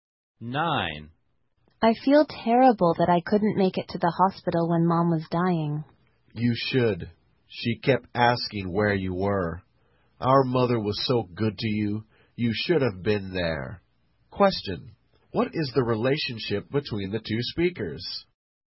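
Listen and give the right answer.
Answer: Siblings (brother and sister).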